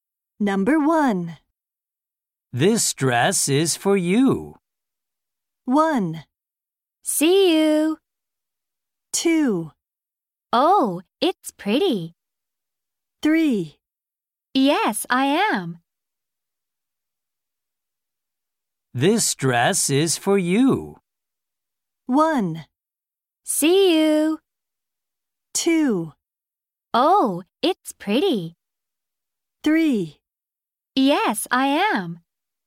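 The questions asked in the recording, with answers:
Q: This dress is for you.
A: 2: Oh, it's pretty.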